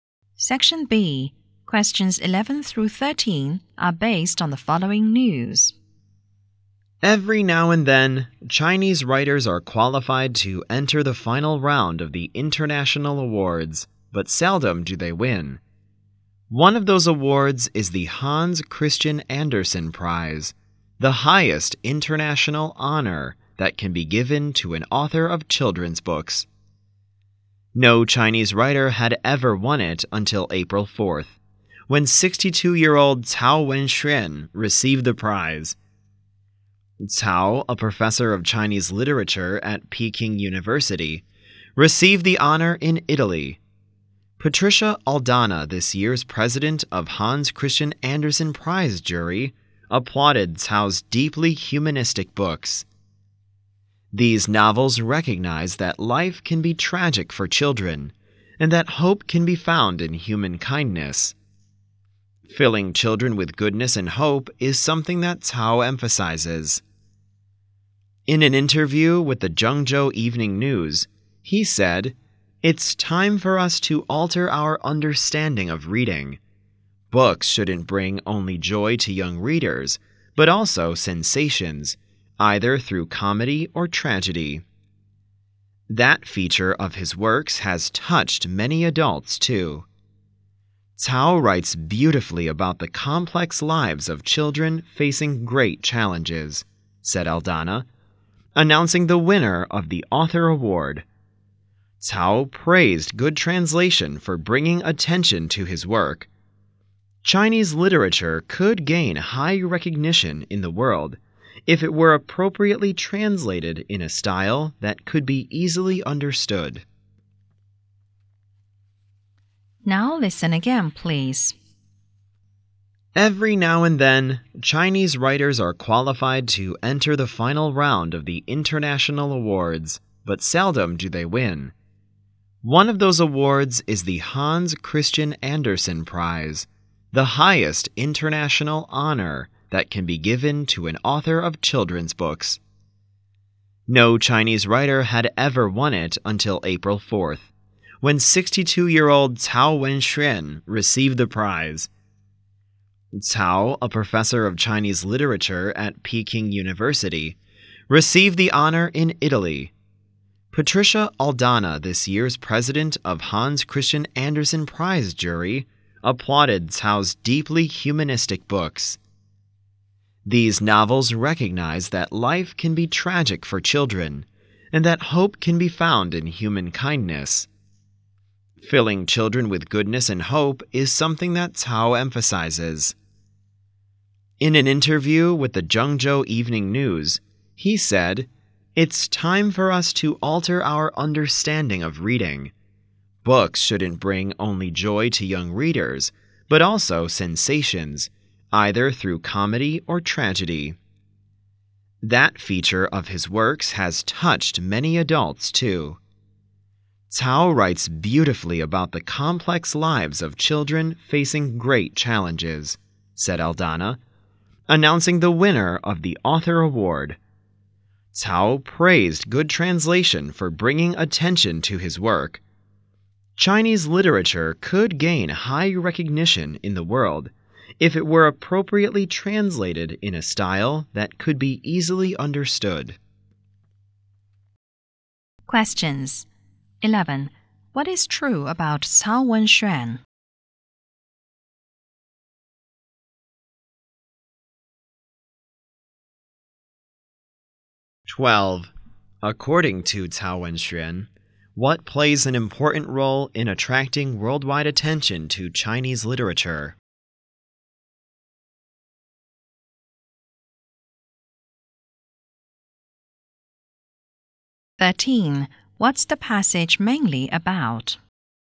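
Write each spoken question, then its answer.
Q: What is true about Cao Wenxuan?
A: He was the first Chinese writer to win the Hans Christian Andersen Prize

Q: According to Cao Wenxuan, what plays an important role in attracting worldwide attention to Chinese literature?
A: Good translation

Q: What's the passage mainly about?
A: A Chinese writer winning the Hans Christian Andersen Prize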